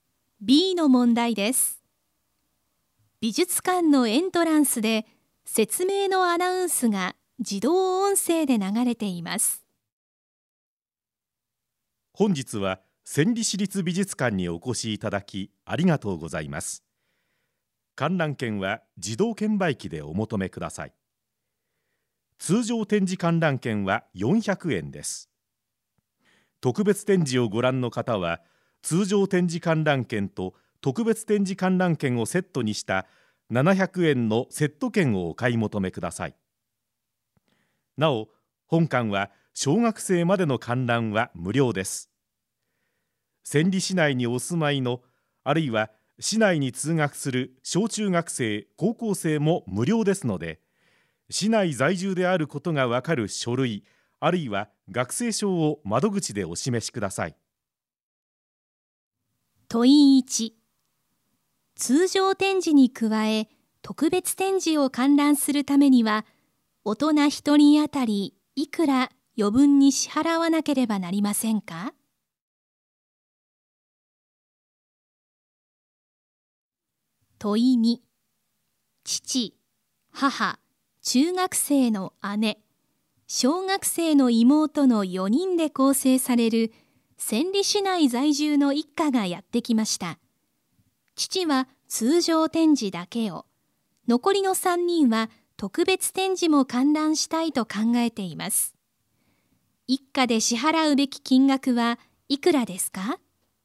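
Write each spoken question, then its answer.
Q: 通常展示に加え、特別展示を観覧するためには、大人1人当たりいくら余分に支払わなければなりませんか?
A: 300円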